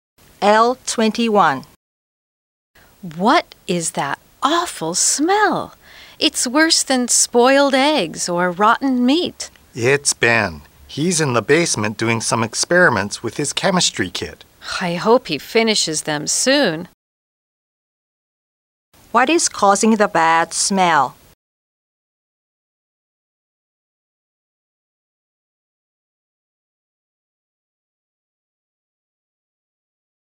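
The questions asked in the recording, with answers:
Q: What is causing the bad smell?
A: Ben's chemistry experiments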